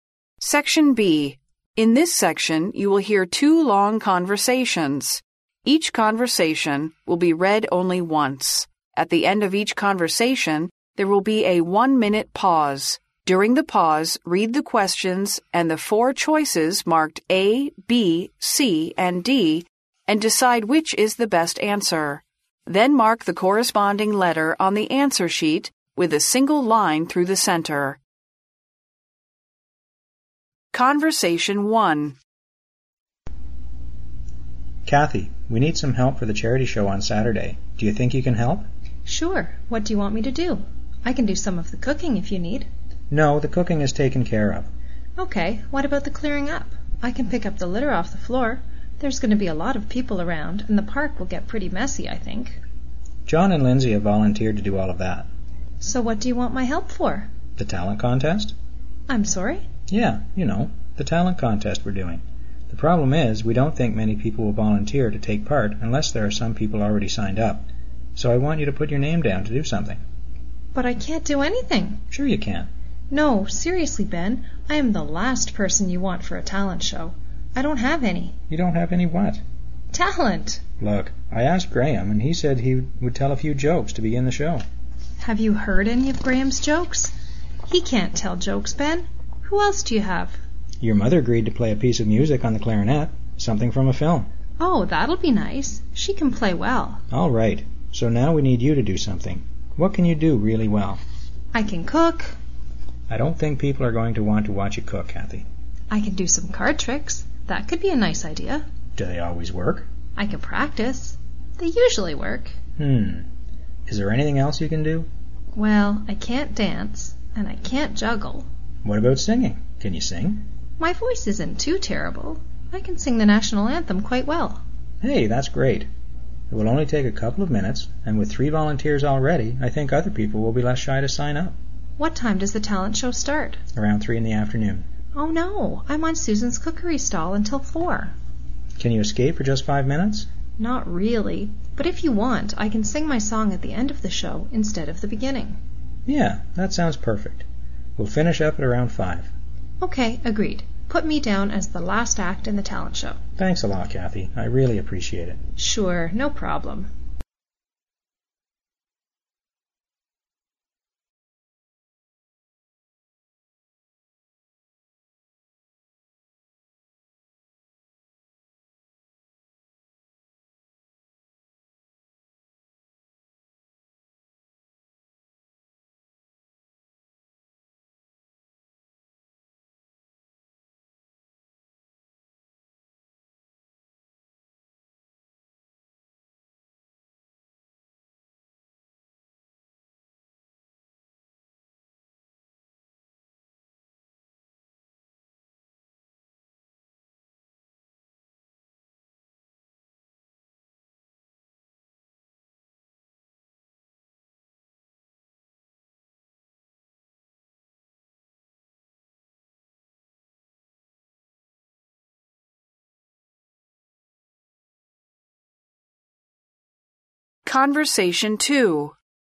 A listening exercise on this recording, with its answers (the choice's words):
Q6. What is Kathy expected to do?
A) Cook for the show.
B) Clear up litter after the show.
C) Host the charity show.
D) Take part in the talent show.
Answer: Take part in the talent show.

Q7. Where will the charity show be held?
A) In a park.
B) In a church.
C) On a sports ground.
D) On a square.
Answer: In a park.

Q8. What is Kathy's mother good at?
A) Playing cards.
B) Telling jokes.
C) Playing the clarinet.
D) Dancing and juggling.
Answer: Playing the clarinet.

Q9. How long will the talent show take?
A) About 1 hour.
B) About 2 hours.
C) About 3 hours.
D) About 4 hours.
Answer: About 2 hours.

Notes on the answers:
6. 对话中,Ben询问Kathy能否在慈善会上帮忙,Kathy说她可以帮忙做饭或者打扫,但是Ben回答这些都已经有人选了,他希望她能参加"才艺表演(talent show)"。因此选择D项。
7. 对话第四句中,Kathy主动提议自己可以帮忙打扫公园,暗示慈善会的举办地点就是在公园。因此选择A项。
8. Ben在说服Kathy参加节目时,提到几位已经报名参加的人,其中包括Kathy的母亲,对话中说她母亲会在现场演奏竖笛,Kathy称赞她母亲的竖笛吹得好。因此选择C项。
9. 由对话可知,才艺表演在下午三点开始,五点结束。因此选择B项。